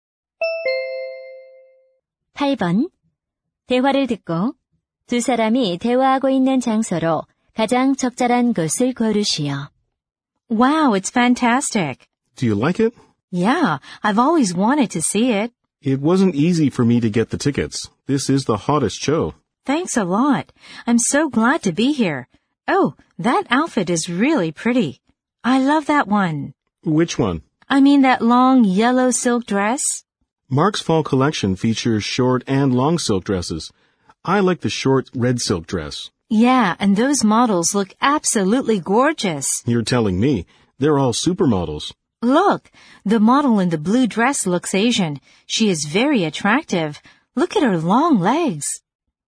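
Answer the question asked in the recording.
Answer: 패션쇼장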